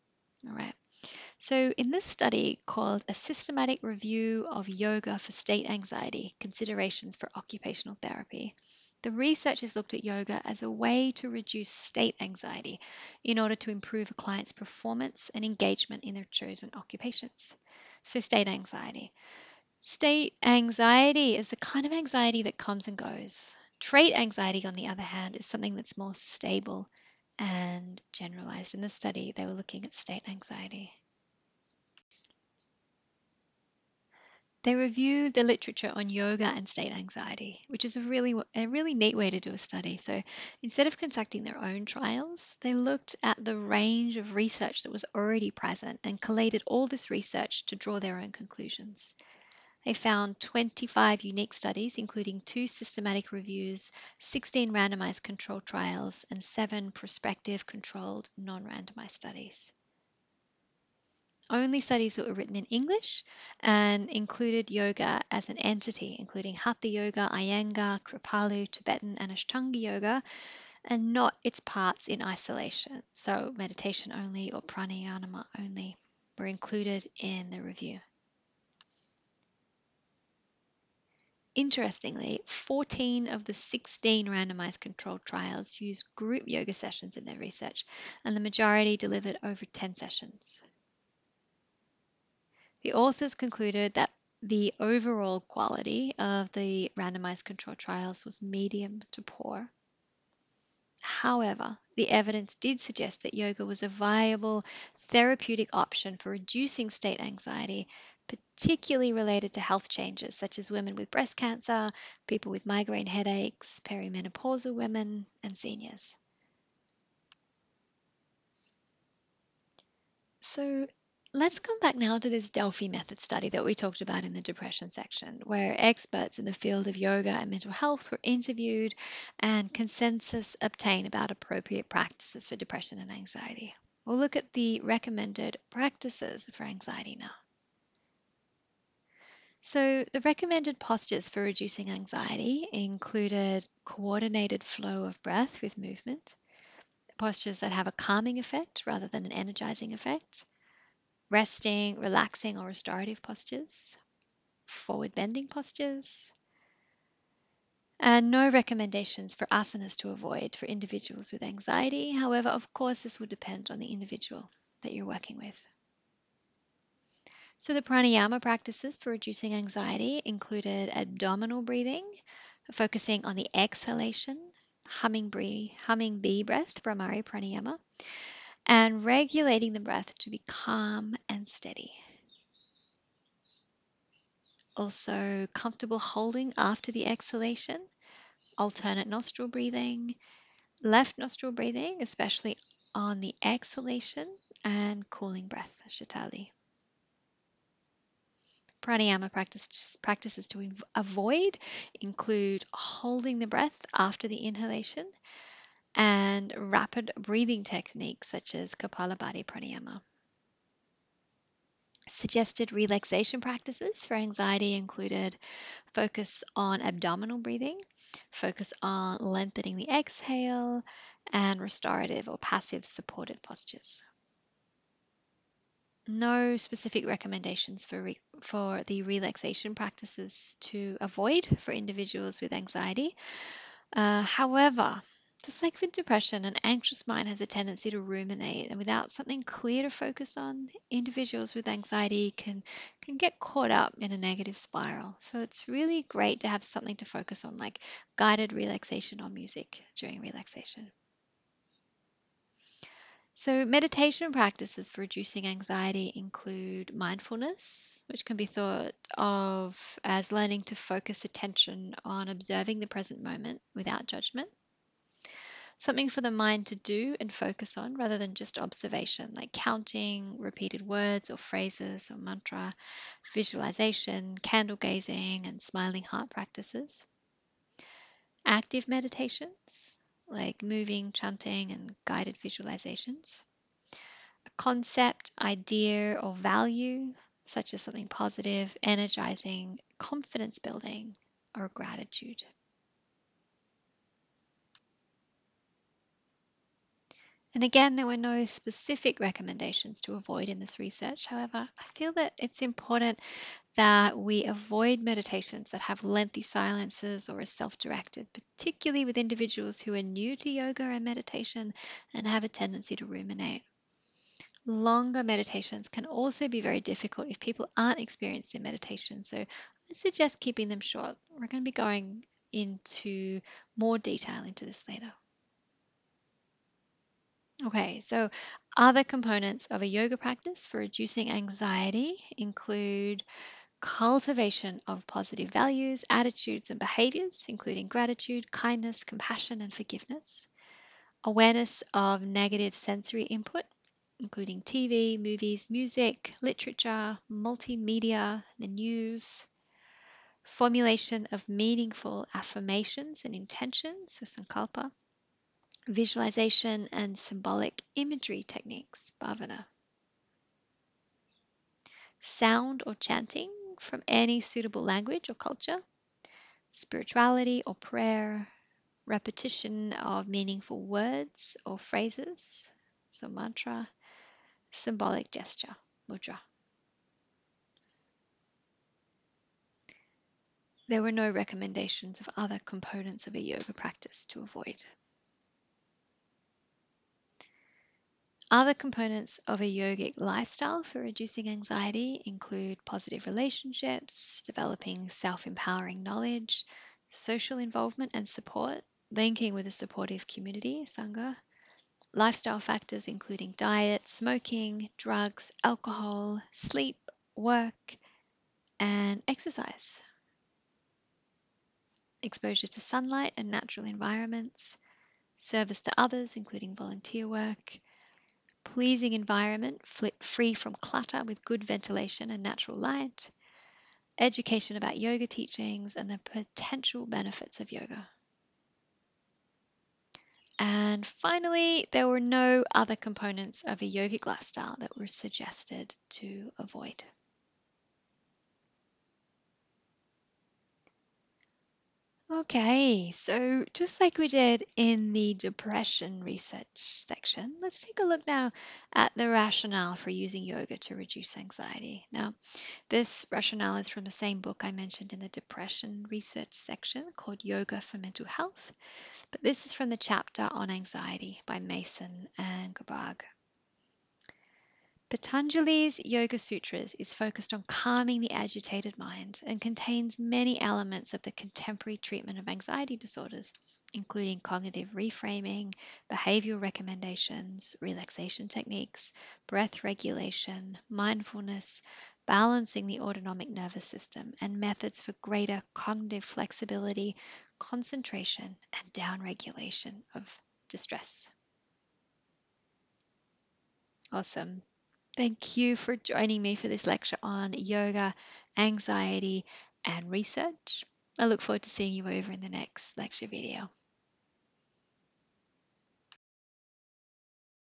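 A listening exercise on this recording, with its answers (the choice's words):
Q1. In the study, Establishing Key Components of Yoga Interventions for Reducing Depression and Anxiety, and Improving Well-Being: A Delphi Method Study, what prāṇāyāma practices were recommended for reducing anxiety?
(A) Abdominal breathing, focus on exhalation, bhrāmarī prāṇāyāma, regulating the breath to be calm and steady, comfortable holding after the exhalation, alternate nostril breathing and sītalī prāṇāyāma.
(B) Abdominal breathing, focus on inhalation, bhrāmarī prāṇāyāma, regulating the breath to be calm and steady, comfortable holding after the inhalation, alternate nostril breathing and kapālabhātī prāṇāyāma.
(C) Prāṇāyāma was not recommended for reducing anxiety.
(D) All of the above.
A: Abdominal breathing, focus on exhalation, bhrāmarī prāṇāyāma, regulating the breath to be calm and steady, comfortable holding after the exhalation, alternate nostril breathing and sītalī prāṇāyāma.

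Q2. In the study, Establishing Key Components of Yoga Interventions for Reducing Depression and Anxiety, and Improving Well-Being: A Delphi Method Study, what āsanas were recommended for reducing anxiety?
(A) Co-ordinated flow of breath with movement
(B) Postures that have a calming effect, rather than energising (including forward bending postures)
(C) Resting, relaxing or restorative postures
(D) All of the above.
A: All of the above.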